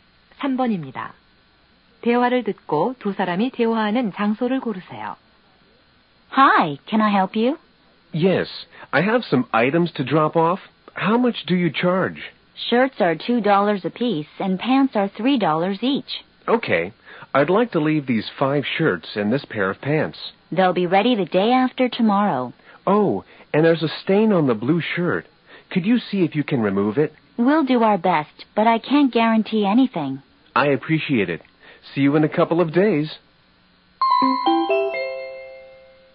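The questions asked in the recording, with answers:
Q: 대화를 듣고 두 사람이 대화하는 장소를 고르세요.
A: 세탁소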